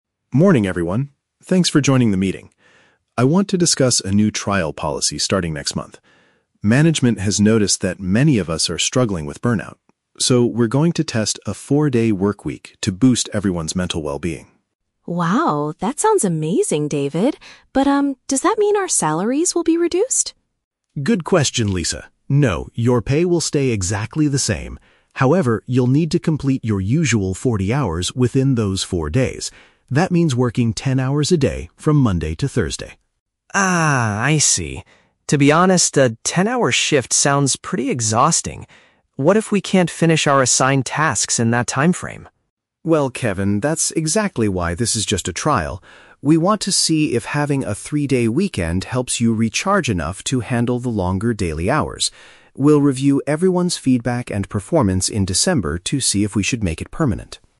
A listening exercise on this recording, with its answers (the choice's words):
Listen to the meeting between a manager (David) and his team members (Lisa and Kevin), and choose the correct answer (A, B, or C).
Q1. Why is the company introducing this new working schedule?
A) To improve the psychological health of the staff.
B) To reduce the amount of money paid to employees.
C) To attract more skilled workers to join the business.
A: To improve the psychological health of the staff.

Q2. What is the condition for the employees to maintain their current income?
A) They must finish all their projects before December.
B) They have to work longer shifts from Monday to Thursday.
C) They must agree to work from home on Fridays.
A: They have to work longer shifts from Monday to Thursday.

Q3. What is Kevin's main concern about the new policy?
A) He is confused about how to track his 40 working hours.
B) He thinks he will get bored during the three-day weekends.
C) He is worried that the extended daily hours will be too tiring.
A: He is worried that the extended daily hours will be too tiring.

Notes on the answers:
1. David says the management wants to "boost everyone's mental well-being" because people are "struggling with burnout." "Psychological health" is a synonym for mental well-being.
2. David explains that to keep the same pay, they must complete their "usual 40 hours within those four days," which means "working ten hours a day."
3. Kevin states that "a ten-hour shift sounds pretty exhausting." The word "tiring" is a paraphrase of "exhausting," and "extended daily hours" paraphrases a "ten-hour shift."

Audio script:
David (Manager): Morning, everyone. Thanks for joining the meeting. I want to discuss a new trial policy starting next month. Management has noticed that many of us are struggling with burnout. So, we're going to test a four-day workweek to boost everyone's mental well-being.
Lisa: Wow, that sounds amazing, David! But, um, does that mean our salaries will be reduced?
David: Good question, Lisa. No, your pay will stay exactly the same. However, you'll need to complete your usual 40 hours within those four days. That means working ten hours a day, from Monday to Thursday.
Kevin: Ah, I see. To be honest, a ten-hour shift sounds pretty exhausting. What if we can't finish our assigned tasks in that timeframe?
David: Well, Kevin, that's exactly why this is just a trial. We want to see if having a three-day weekend helps you recharge enough to handle the longer daily hours. We'll review everyone's feedback and performance in December to see if we should make it permanent.